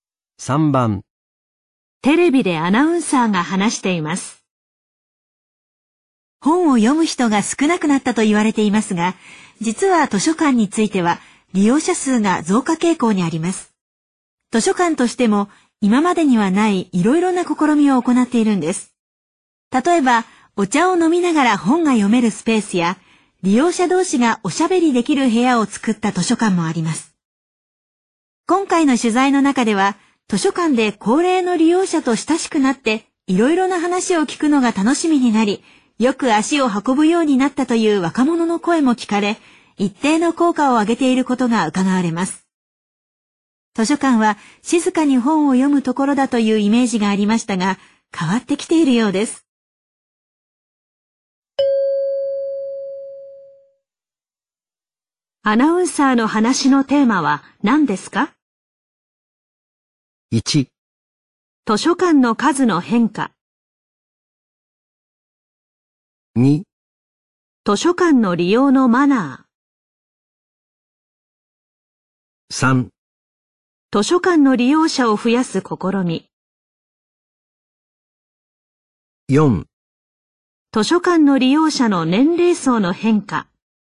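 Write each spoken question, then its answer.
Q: アナウンサーの話のテーマは何ですか?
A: 3: 図書館の利用者を増やす試み。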